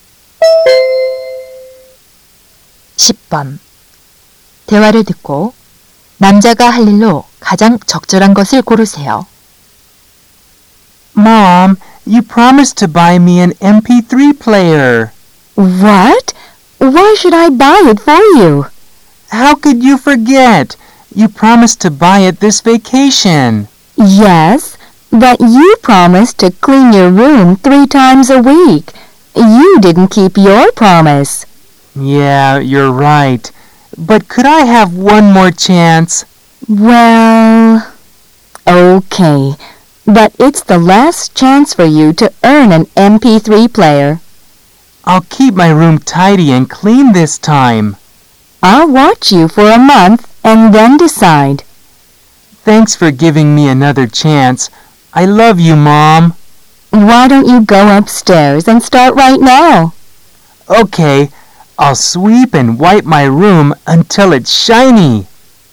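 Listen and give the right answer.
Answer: 방 청소하기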